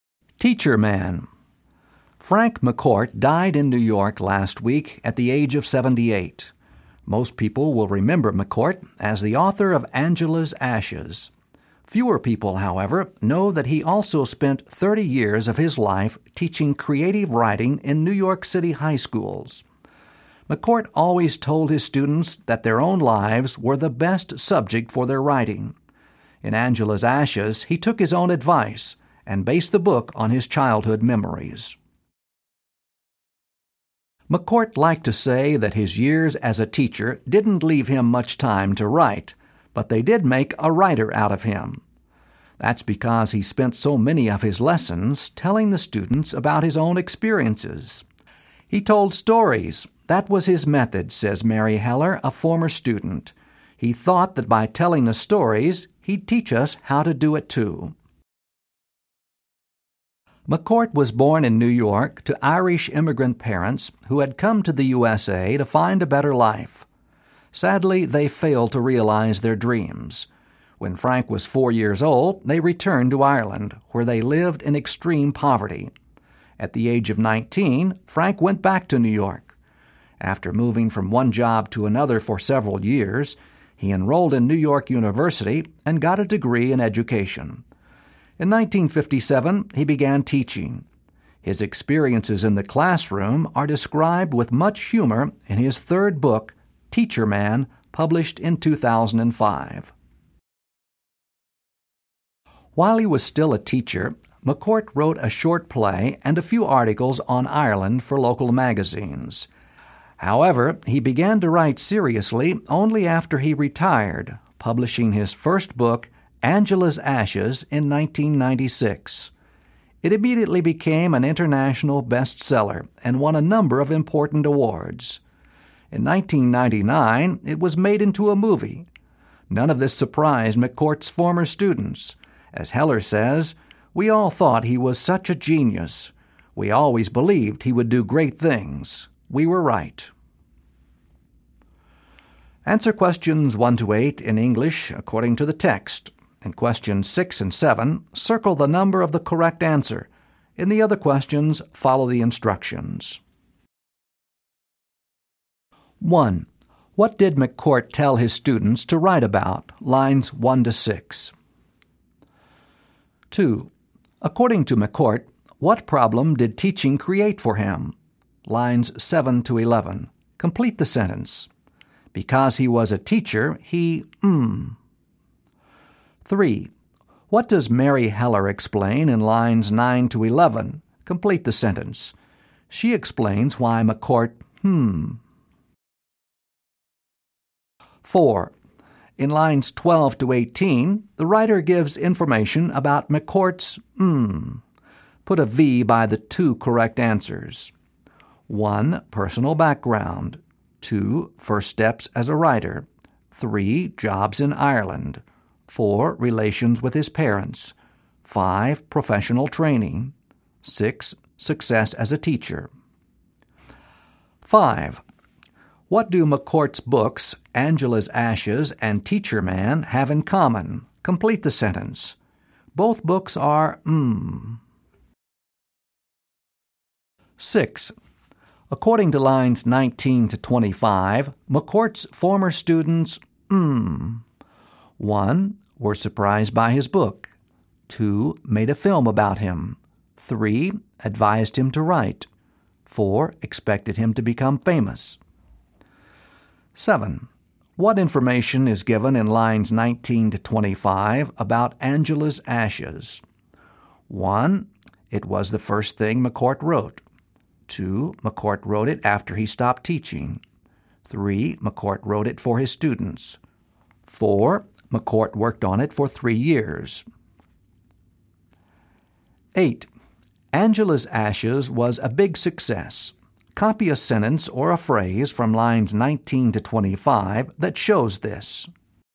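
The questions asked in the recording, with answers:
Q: What did McCourt tell his students to write about?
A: Their own lives

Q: What do McCourt's books, Angela's Ashes and Teacher Man, have in common?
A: Both are based on his own life experiences

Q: According to lines 19 to 25, McCourt's former students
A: 4: Expected him to become famous.

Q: What information is given in lines 19 to 25 about Angela's Ashes?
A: 2: McCourt wrote it after he stopped teaching.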